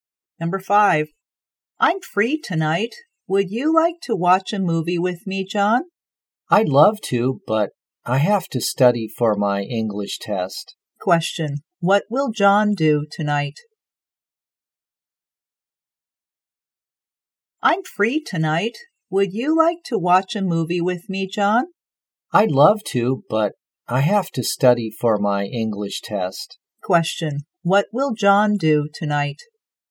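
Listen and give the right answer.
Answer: Study for his English test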